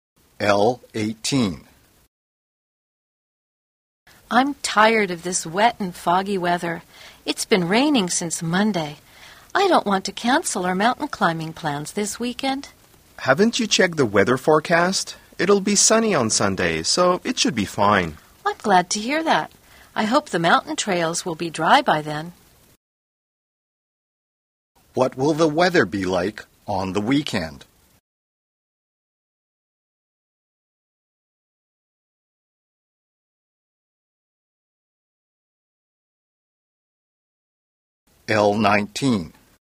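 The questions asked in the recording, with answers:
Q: What will the weather be like on the weekend?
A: Sunny on Sunday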